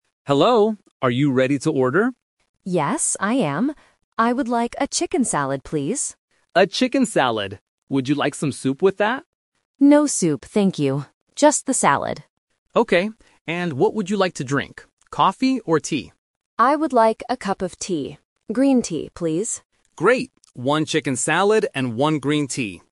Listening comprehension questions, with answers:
Listen to the conversation between a waiter and a customer. Choose the correct answer (A, B, or C).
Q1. What food does the customer want?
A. Soup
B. Chicken salad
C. A sandwich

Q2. What does the customer say "no" to?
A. Tea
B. Salad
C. Soup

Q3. What will the customer drink?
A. Green tea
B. Coffee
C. Water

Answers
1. B
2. C
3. A

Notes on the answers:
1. The customer clearly says, "I would like a chicken salad, please."
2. The waiter asks, "Would you like some soup with that?" and the customer answers, "No soup, thank you."
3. The customer says, "I would like a cup of tea. Green tea, please."

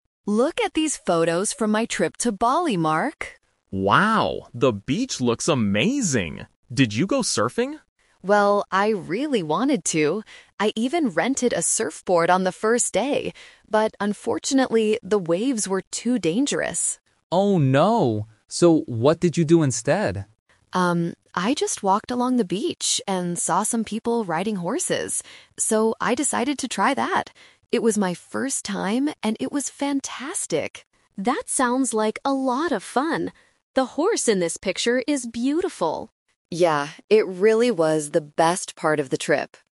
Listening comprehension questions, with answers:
Listen to the conversation between two friends and choose the correct answer (A, B, or C) for each question.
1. What did the woman actually do on the beach?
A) She went surfing.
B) She went swimming.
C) She rode a horse.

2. Why didn't she do what she originally planned?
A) The weather was too cold.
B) The waves were not safe.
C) She couldn't find a surfboard.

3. How did the woman feel about her activity?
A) She thought it was a great experience.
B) She was scared because it was her first time.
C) She thought it was boring.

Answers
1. C
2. B
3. A

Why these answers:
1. The woman says "I saw some people riding horses. So, I decided to try that!". Option A is the trap: she mentions surfing ("I rented a surfboard"), but she didn't actually do it. Option B is plausible for a beach holiday but is never mentioned in the audio.
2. The woman clearly states, "But unfortunately, the waves were too dangerous." Option C is the trap: she explicitly says she "rented a surfboard", so finding one was not the problem. Option A is not mentioned.
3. She describes the horseback riding as "fantastic" and "the best part of the trip." Option B is the trap: she mentions it was her "first time," which might lead listeners to assume she was scared, but she never expresses fear.

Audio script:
Woman: Look at these photos from my trip to Bali, Mark.
Man: Wow, the beach looks amazing! Did you go surfing?
Woman: Well, I really wanted to. I even rented a surfboard on the first day. But unfortunately, the waves were too dangerous.
Man: Oh no! So what did you do instead?
Woman: Um, I just walked along the beach and saw some people riding horses. So, I decided to try that! It was my first time, and it was fantastic.
Man: That sounds like a lot of fun. The horse in this picture is beautiful.

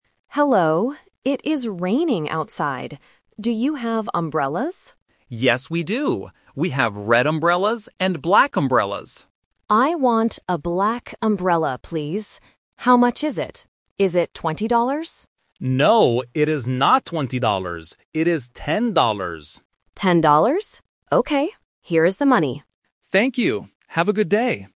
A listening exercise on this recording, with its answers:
Listen to the conversation in a shop. Circle the correct answer (A, B, or C).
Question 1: What is the weather like outside?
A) Raining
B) Sunny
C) Snowy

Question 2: What color umbrella does the customer buy?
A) Red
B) Black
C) Blue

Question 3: How much is the umbrella?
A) 10 dollars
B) 15 dollars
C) 20 dollars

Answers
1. A
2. B
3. A

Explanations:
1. The customer clearly says at the beginning, "It is raining outside." The Trap: Option (B) "Sunny" and Option (C) "Snowy" are common weather words, but they are not mentioned in the audio.
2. The customer says, "I want a black umbrella, please". The Trap: Option (A) "Red" is mentioned by the shop assistant ("We have red umbrellas..."), but the customer does not choose it. Not Mentioned: Option (C) "Blue" is never mentioned.
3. The shop assistant says clearly, "It is ten dollars," and the customer repeats it. The Trap: Option (C) "20 dollars" is mentioned because the customer guesses the price ("Is it twenty dollars?"), but the assistant says "No". Not Mentioned: Option (B) "15 dollars" is completely new information.

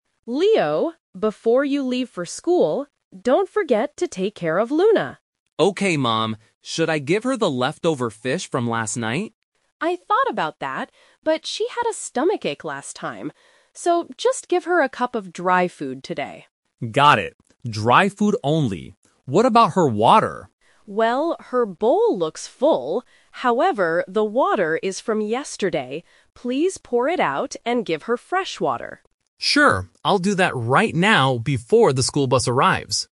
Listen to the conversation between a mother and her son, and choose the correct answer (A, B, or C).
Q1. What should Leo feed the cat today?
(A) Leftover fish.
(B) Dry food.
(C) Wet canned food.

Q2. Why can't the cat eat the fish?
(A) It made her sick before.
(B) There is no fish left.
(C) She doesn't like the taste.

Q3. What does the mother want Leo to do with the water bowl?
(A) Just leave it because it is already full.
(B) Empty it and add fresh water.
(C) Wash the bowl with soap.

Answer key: 1B, 2A, 3B

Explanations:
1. The mother says, "just give her a cup of dry food today." Option (A) is the trap; Leo suggests giving the leftover fish, but the mother rejects this idea. Option (C) is never mentioned.
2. The mother explains that the cat "had a stomachache last time" she ate it. Option (B) and (C) are plausible reasons in real life, but they are not mentioned in the audio.
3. The mother clearly instructs Leo to "pour it out and give her fresh water." Option (A) is the trap; the mother admits the bowl looks full, but she still wants him to change it because the water is old. Option (C) is not mentioned.

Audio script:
Mom: Leo, before you leave for school, don't forget to take care of Luna.
Leo: Okay, Mom. Should I give her the leftover fish from last night?
Mom: I thought about that, but she had a stomachache last time. So, just give her a cup of dry food today.
Leo: Got it. Dry food only. What about her water?
Mom: Well, her bowl looks full, however, the water is from yesterday. Please pour it out and give her fresh water.

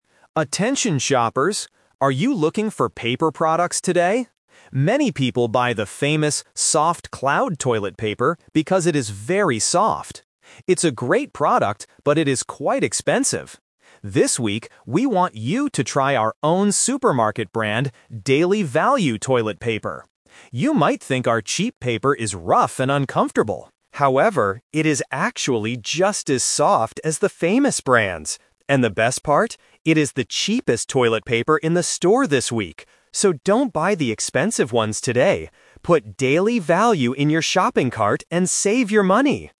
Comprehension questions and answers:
Listen to the supermarket announcement and choose the correct answer (A, B, or C).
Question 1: What is the problem with "Soft-Cloud" toilet paper?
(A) It is quite expensive.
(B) It is very rough.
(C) The store does not have it today.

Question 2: What does the announcer say about the "Daily Value" toilet paper?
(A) It is rough and uncomfortable.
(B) It is just as soft as the famous brands.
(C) It is a very famous brand.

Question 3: Which toilet paper does the announcer tell shoppers to buy today?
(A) "Soft-Cloud", because it is very soft.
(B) "Daily Value", because it saves money.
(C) She tells them not to buy any toilet paper.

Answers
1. A
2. B
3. B

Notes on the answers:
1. The announcer says that Soft-Cloud toilet paper is a good product, "but it is quite expensive." Option (B) is a trap (people's preconceived notions about cheap toilet paper). Option (C) sounds reasonable in a supermarket setting but isn't mentioned.
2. This sentence uses a "Twist" technique. The advertiser twists the customer's thinking: "You might think our cheap paper is rough... However, it is actually just as soft as the famous brands." Option (A) is a trap (what people think, not the truth). Option (C) is wrong because it's the supermarket's own brand.
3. Finally, the reader advises the customer to add "Daily Value" to the cart and "save your money." Option (A) is a trap, representing a common customer habit (Many people buy...), but the purpose of the message is to advise them not to buy that expensive item today. Option (C) is completely misleading.

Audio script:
Announcer: Attention shoppers! Are you looking for paper products today? Many people buy the famous "Soft-Cloud" toilet paper because it is very soft. It's a great product, but it is quite expensive. This week, we want you to try our own supermarket brand, "Daily Value" toilet paper. You might think our cheap paper is rough and uncomfortable. However, it is actually just as soft as the famous brands! And the best part? It is the cheapest toilet paper in the store this week. So, don't buy the expensive ones today. Put "Daily Value" in your shopping cart and save your money!

